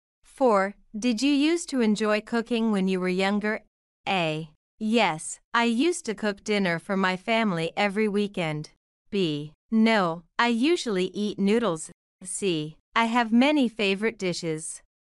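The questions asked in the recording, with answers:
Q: Did you used to enjoy cooking when you were younger?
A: A: Yes, I used to cook dinner for my family every weekend.

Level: A2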